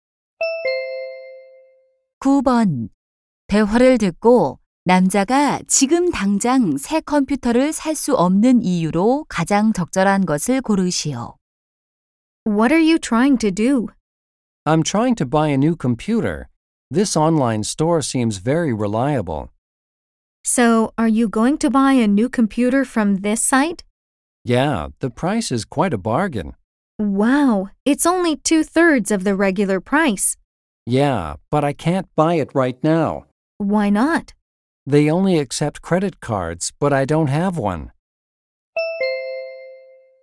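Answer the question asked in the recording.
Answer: 신용카드가 없어서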